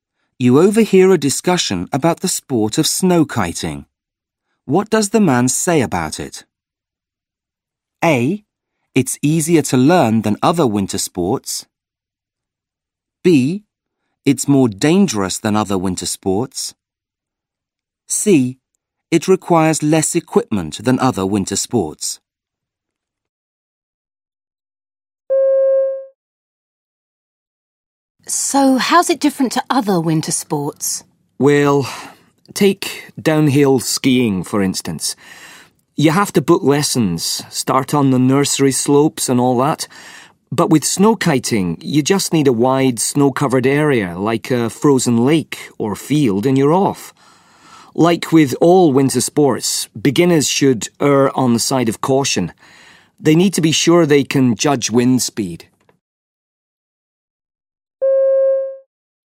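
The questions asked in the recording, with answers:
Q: What does the man say about it?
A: A: It's easier to learn than other winter sports.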